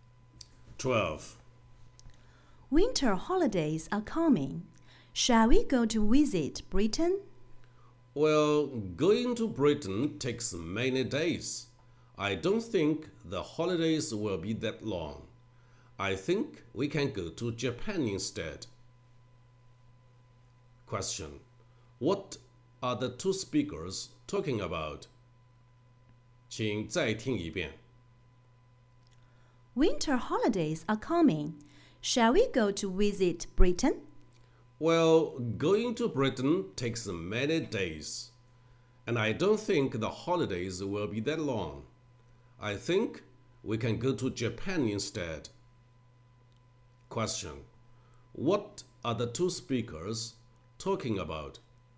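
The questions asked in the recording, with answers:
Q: What are the two speakers talking about?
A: Where to go for the winter holidays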